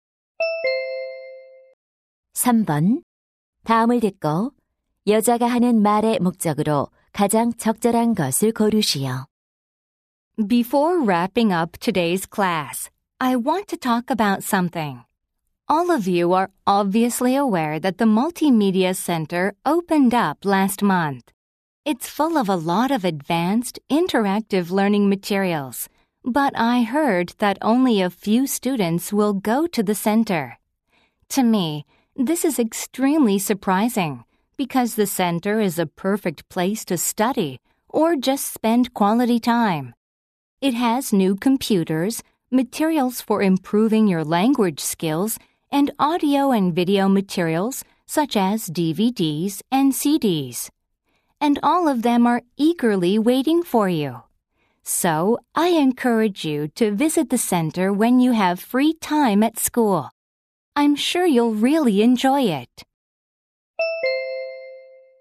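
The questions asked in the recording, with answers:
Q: 다음을 듣고 여자가 하는 말의 목적으로 가장 적절한 것을 고르시오.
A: 학생들에게 멀티미디어 센터 방문을 권장하려고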